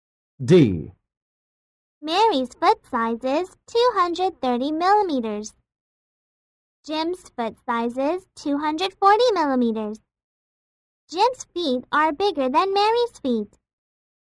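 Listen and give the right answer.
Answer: True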